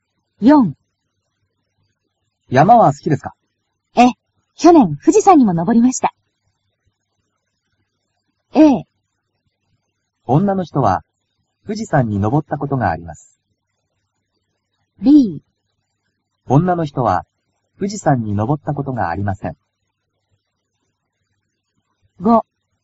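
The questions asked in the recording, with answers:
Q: 女の人は、富士山に登ったことがあります。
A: A: 女の人は、富士山に登ったことがあります。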